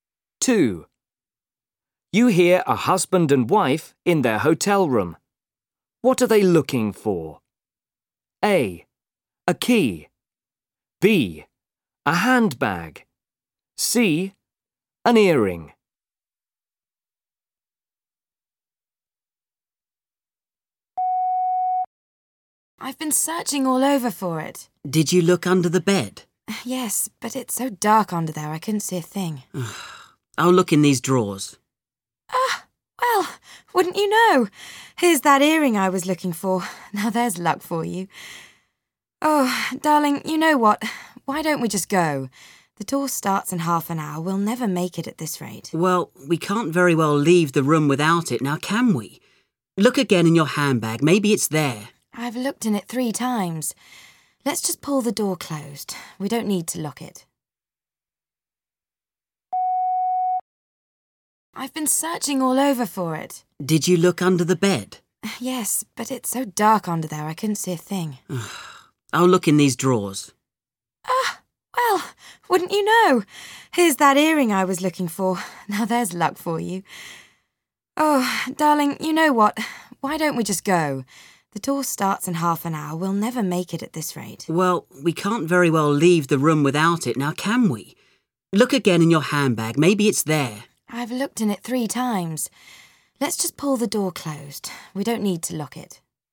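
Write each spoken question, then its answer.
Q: What are they looking for?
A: A: A key.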